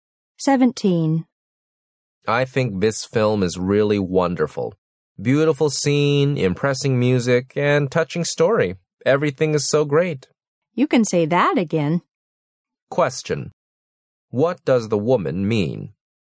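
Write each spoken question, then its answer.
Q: What does the woman mean?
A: She agrees that the film is wonderful.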